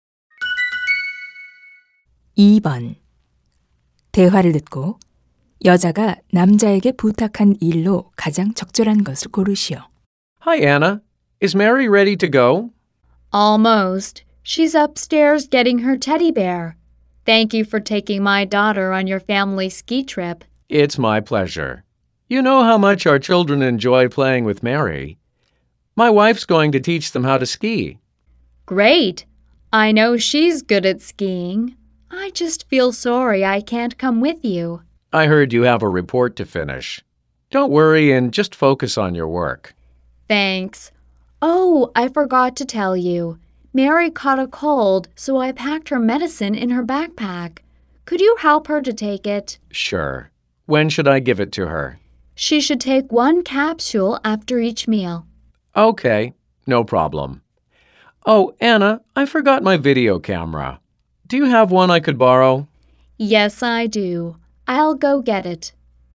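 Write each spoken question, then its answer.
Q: 대화를 듣고 여자가 남자에게 부탁한 일로 가장 적절한 것을 고르시오.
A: 딸(Mary)이 약 먹는 것 도와주기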